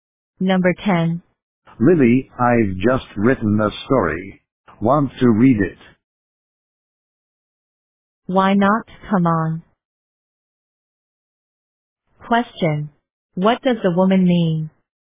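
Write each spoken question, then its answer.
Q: What does the woman mean?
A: She would like to read the story.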